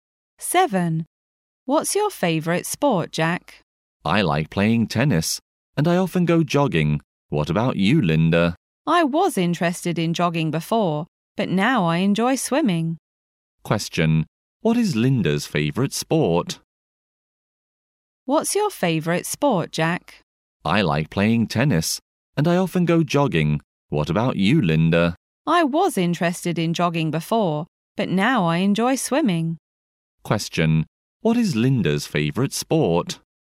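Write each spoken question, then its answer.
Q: What is Linda's favourite sport?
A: Swimming.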